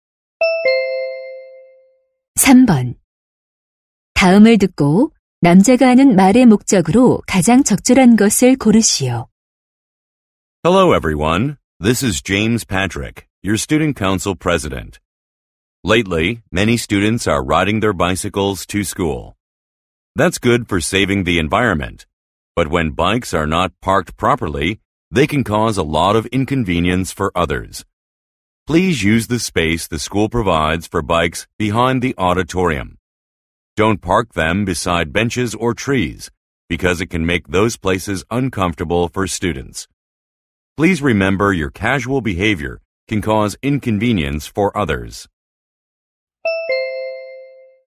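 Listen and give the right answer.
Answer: 자전거를 지정된 장소에 주차하도록 요청하려고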